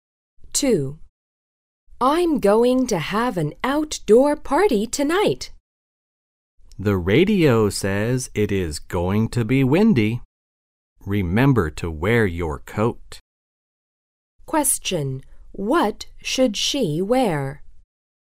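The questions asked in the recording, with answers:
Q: What should she wear?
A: Her coat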